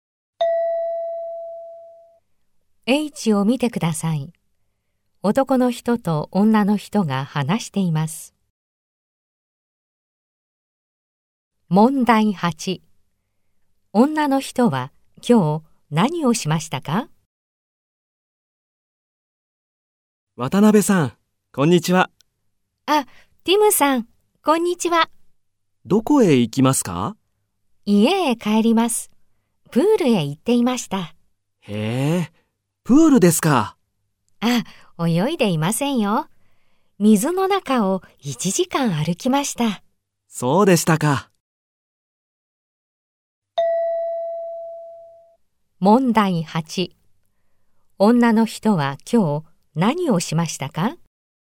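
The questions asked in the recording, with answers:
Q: 女の人は今日何をしましたか?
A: プールで1時間水の中を歩きました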